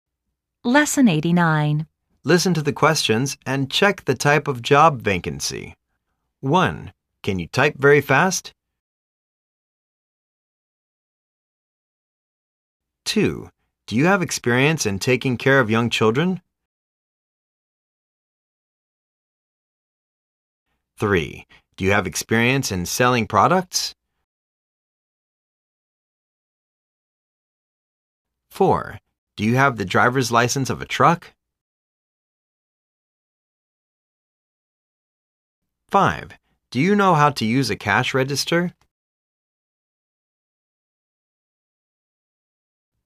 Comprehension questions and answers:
Listen to the questions and check the type of job vacancy.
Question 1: Can you type very fast?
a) model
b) receptionist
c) secretary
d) housekeeper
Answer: c) secretary

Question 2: Do you have experience in taking care of young children?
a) kindergarten teacher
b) painter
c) mover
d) telemarketer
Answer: a) kindergarten teacher

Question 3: Do you have experience in selling products?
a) interpreter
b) machine operator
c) reporter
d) salesperson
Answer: d) salesperson

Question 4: Do you have the driver's license of a truck?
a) travel agent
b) delivery person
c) cook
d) hairdresser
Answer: b) delivery person

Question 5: Do you know how to use a cash register?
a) home attendant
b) baby-sitter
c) garment worker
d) supermarket cashier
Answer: d) supermarket cashier

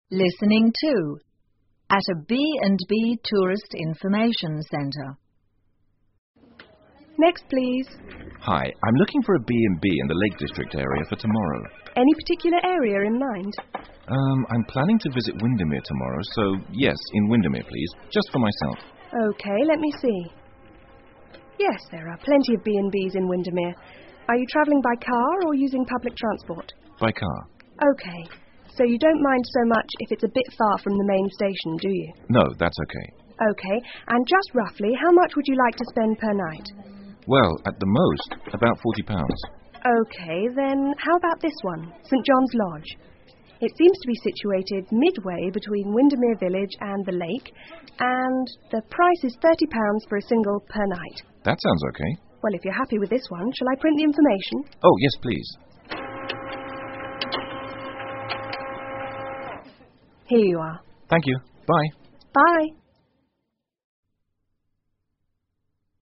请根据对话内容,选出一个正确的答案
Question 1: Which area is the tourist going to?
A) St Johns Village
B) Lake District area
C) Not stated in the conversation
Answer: B) Lake District area

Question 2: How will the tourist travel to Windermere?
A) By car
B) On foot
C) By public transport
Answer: A) By car

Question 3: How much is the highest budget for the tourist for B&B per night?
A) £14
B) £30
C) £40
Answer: C) £40

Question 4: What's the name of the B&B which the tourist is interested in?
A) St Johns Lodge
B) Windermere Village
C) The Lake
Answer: A) St Johns Lodge

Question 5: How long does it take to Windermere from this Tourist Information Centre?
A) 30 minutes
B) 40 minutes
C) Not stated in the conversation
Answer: C) Not stated in the conversation

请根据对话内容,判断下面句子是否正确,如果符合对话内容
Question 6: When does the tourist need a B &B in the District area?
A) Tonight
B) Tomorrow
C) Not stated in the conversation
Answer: B) Tomorrow

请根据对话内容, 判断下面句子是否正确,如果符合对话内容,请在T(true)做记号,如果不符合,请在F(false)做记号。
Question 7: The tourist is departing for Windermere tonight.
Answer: F

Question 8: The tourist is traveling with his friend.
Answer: F

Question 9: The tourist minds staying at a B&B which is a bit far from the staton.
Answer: F

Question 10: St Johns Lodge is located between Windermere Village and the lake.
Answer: T

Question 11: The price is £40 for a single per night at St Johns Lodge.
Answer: F

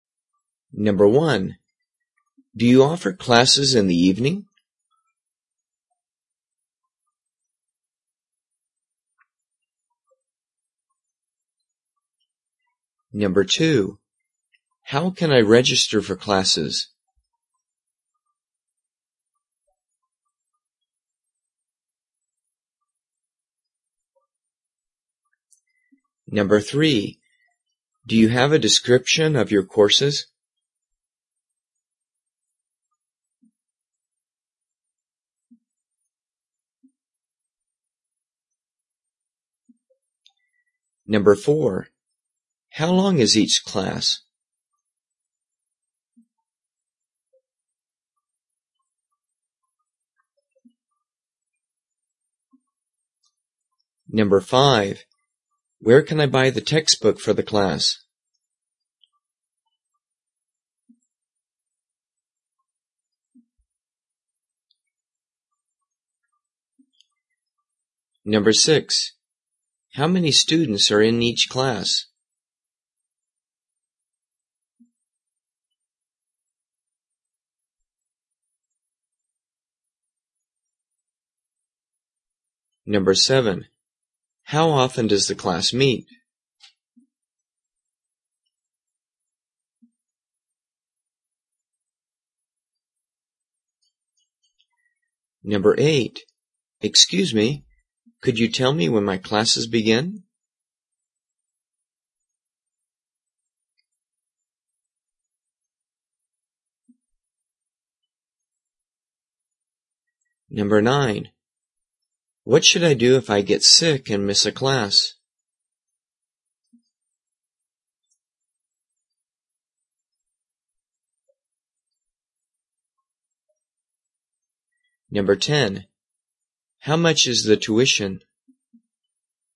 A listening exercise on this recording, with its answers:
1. Do you _________________________ in the ___________?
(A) Sorry, but books are not included.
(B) Yes, you can pay online.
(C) Yes, we do. They begin at 7:00 p.m.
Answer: (C) Yes, we do. They begin at 7:00 p.m.

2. How ______________________________ classes?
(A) The classes meet twice a week.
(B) You can do that online on our Website.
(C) Classes only meet in the mornings.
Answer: (B) You can do that online on our Website.

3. Do you ___________________________courses?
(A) Here. Take a look at this information.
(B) Yes. Our computer classes start tomorrow.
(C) No. The classes are all taught in this building.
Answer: (A) Here. Take a look at this information.

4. ___________________________________ class?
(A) Yes. You can eat and drink in class.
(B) Each class lasts 70 minutes.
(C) No. You can't bring your children to class.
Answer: (B) Each class lasts 70 minutes.

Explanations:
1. Do you offer classes in the evening? (Yes, we do. They begin at 7:00 p.m.)
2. How can I register for classes? (You can do that online on our Website.)
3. Do you have a description of your courses? (Here. Take a look at this information.)
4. How long is each class? (Each class lasts 70 minutes.)

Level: 中级

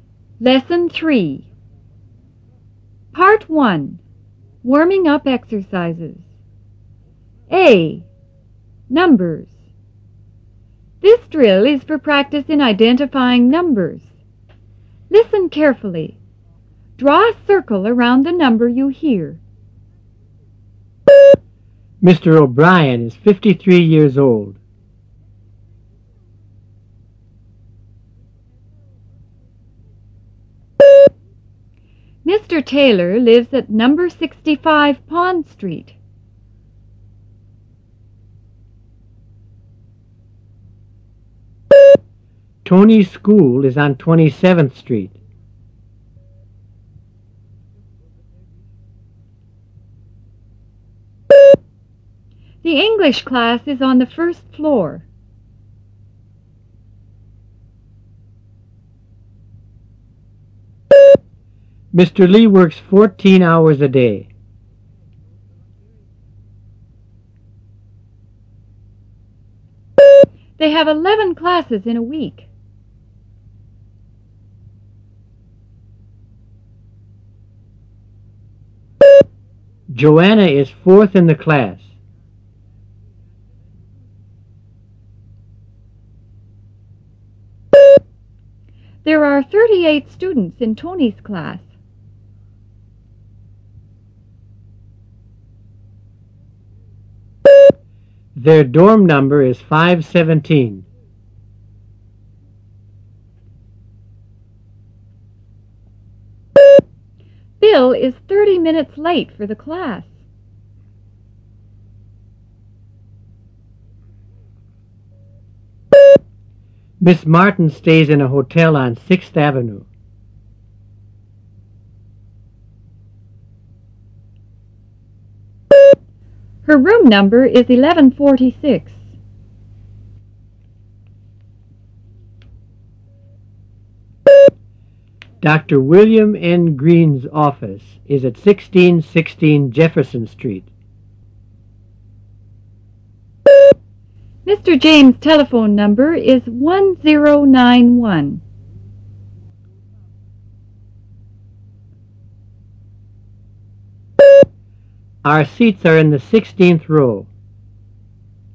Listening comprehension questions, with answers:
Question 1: Mr. O'Brien is ... years old.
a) 53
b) 63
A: a) 53

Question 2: Mr. Taylor lives at No. ... ,Pond Street.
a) 65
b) 55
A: a) 65

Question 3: Tony's school is on ... Street.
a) 22nd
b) 27th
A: b) 27th

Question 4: The English class is on the ... floor.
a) 4th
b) 1st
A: b) 1st

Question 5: Mr. Lee works ... hours a day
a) 13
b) 14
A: b) 14

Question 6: They have ... English classes in a week.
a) 7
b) 11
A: b) 11

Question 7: Joana is ... in the class.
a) 1st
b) 4th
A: b) 4th

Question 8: There are ... students in Tony's class.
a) 48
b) 38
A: b) 38

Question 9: Their dorm number is ... .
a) 517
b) 570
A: a) 517

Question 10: Bill is ... minutes late for the class.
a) 20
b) 30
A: b) 30

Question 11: Miss Martin stays in a hotel on ... Avenue.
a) 6th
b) 5th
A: a) 6th

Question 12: Her room number is ... .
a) 1136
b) 1146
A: b) 1146

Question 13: Dr. William N. Gren's office is at ... Jefferson Street.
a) 1616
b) 1515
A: a) 1616

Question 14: Mr. James' telephone number is ... .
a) 1051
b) 1091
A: b) 1091

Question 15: Our seats are in teh ... row.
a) 16th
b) 15th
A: a) 16th

